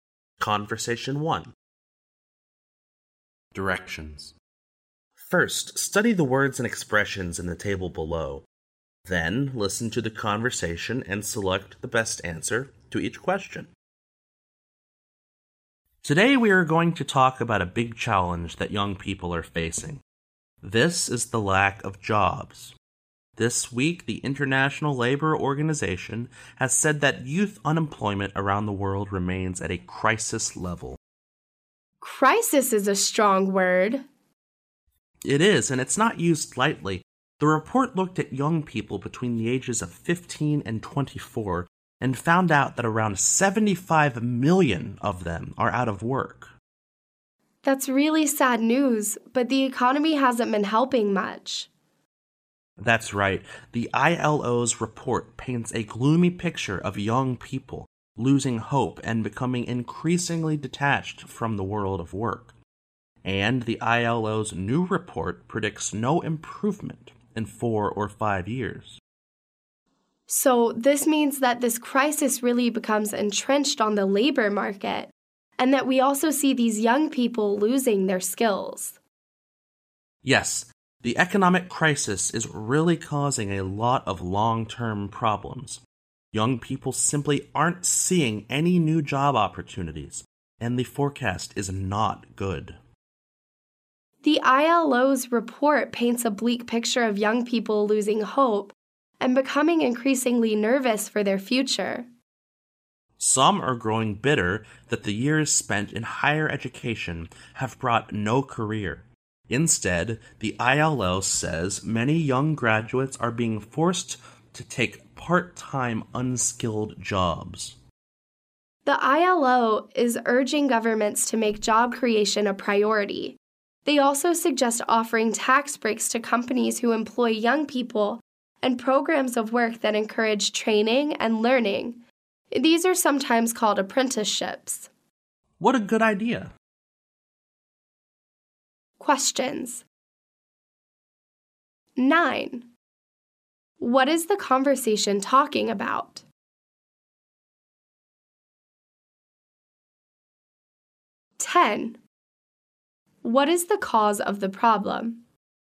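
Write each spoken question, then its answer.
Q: What is the conversation talking about?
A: Youth unemployment, the lack of jobs for young people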